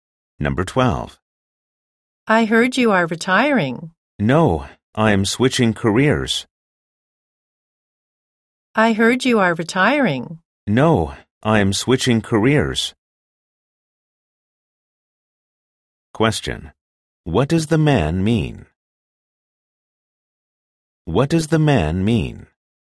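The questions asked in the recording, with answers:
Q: What does the man mean?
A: He is not retiring; he is changing careers.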